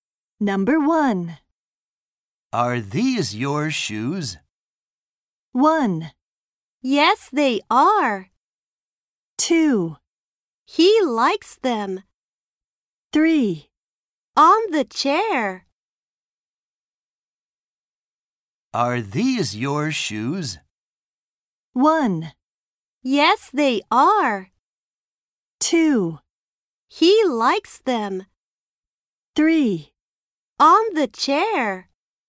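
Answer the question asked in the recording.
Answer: 1: Yes, they are.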